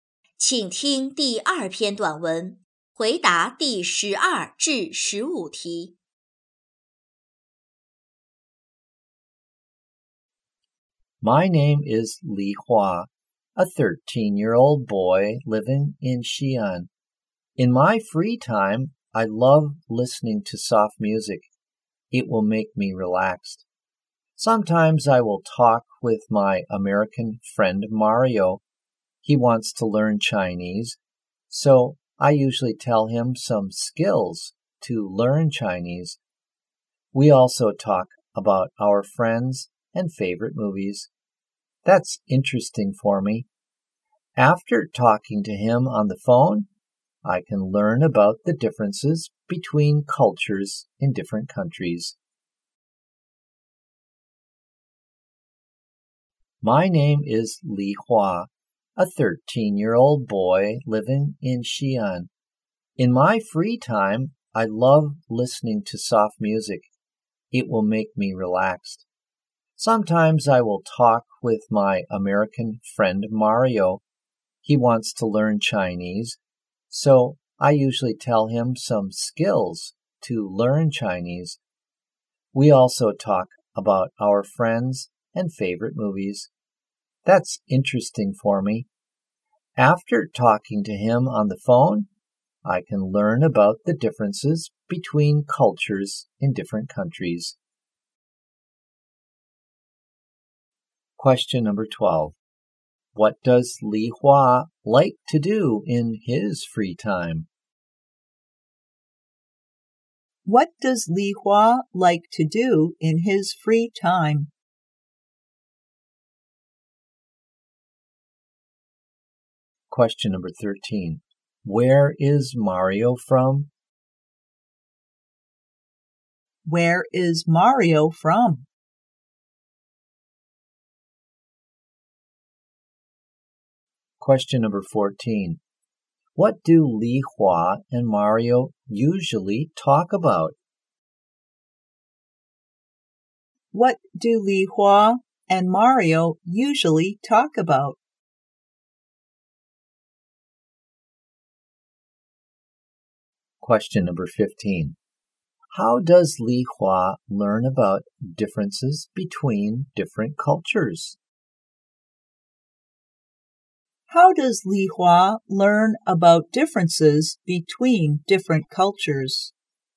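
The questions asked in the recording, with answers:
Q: What does Li Hua like to do in his free time?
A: Listening to soft music

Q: Where is Mario from?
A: America

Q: How does Li Hua learn about differences between different cultures?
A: By talking with Mario on the phone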